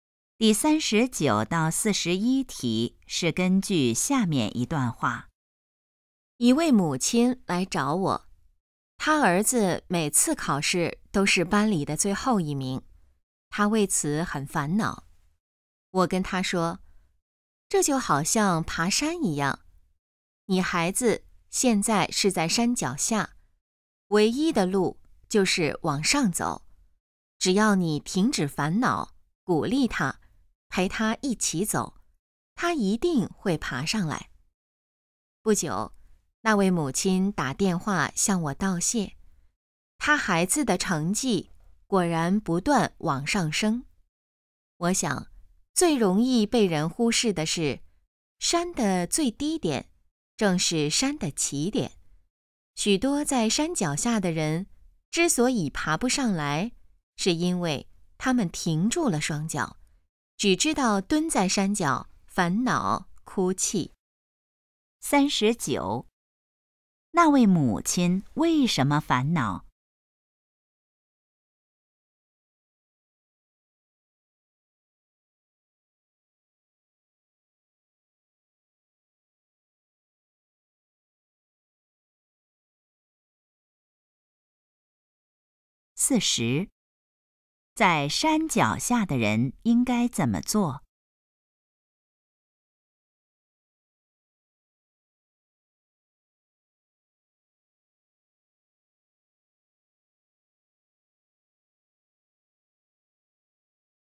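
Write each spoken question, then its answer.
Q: 那位母亲为什么烦恼?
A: 儿子每次考试都是最后一名

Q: 在山脚下的人应该怎么做?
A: 往上走,不要停住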